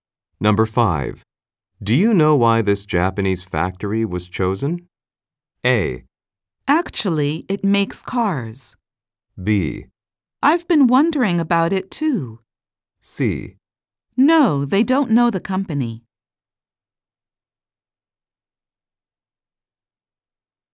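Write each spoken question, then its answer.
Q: Do you know why this Japanese factory was chosen?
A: B: I've been wondering about it too.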